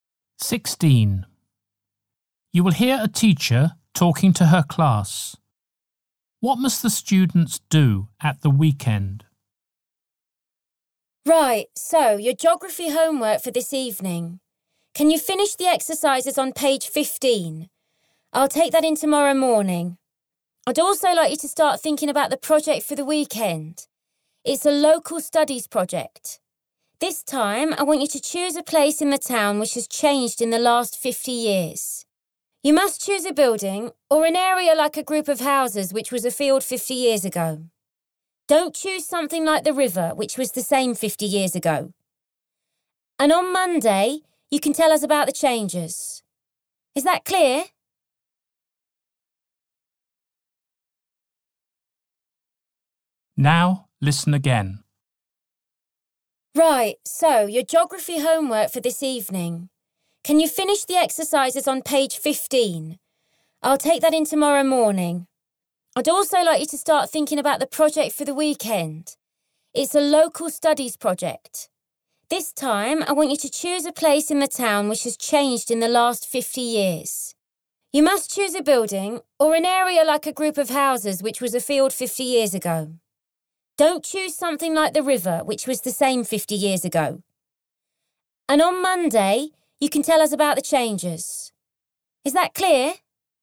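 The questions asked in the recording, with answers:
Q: What must the students do at the weekend?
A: Choose a place in the town that has changed in the last 50 years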